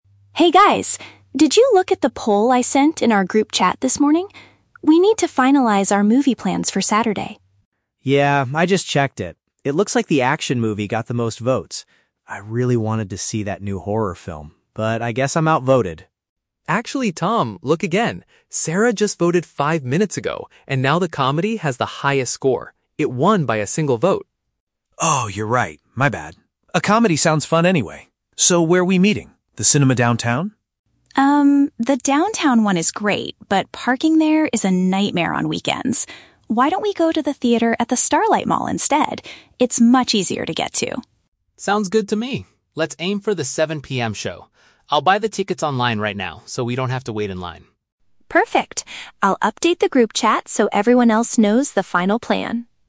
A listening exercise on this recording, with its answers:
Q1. What type of film will the friends watch?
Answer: A funny movie to make them laugh.

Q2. Why do they decide to avoid the downtown cinema?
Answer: Finding a place to leave their cars is extremely difficult.

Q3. What is Ben going to do next?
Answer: Purchase their seats for the movie on the internet.

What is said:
Lisa: Hey guys, did you look at the poll I sent in our group chat this morning? We need to finalize our movie plans for Saturday.
Tom: Yeah, I just checked it. It looks like the action movie got the most votes. I really wanted to see that new horror film, but I guess I'm outvoted.
Ben: Actually, Tom, look again. Sarah just voted five minutes ago, and now the comedy has the highest score. It won by a single vote!
Tom: Oh, you're right. My bad. A comedy sounds fun anyway. So, where are we meeting? The cinema downtown?
Lisa: Um, the downtown one is great, but parking there is a nightmare on weekends. Why don't we go to the theater at the Starlight Mall instead? It's much easier to get to.
Ben: Sounds good to me. Let's aim for the 7 PM show. I'll buy the tickets online right now so we don't have to wait in line.